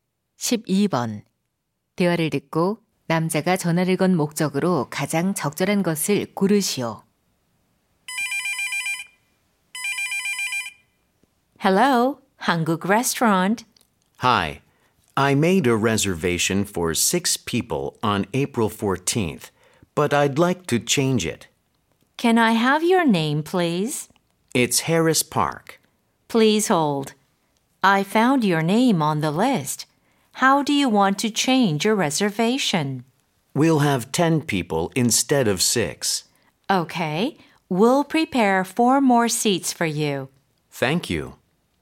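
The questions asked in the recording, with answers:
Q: 대화를 듣고 남자가 전화를 건 목적으로 가장 적절한 것을 고르시오.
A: 예약 인원 변경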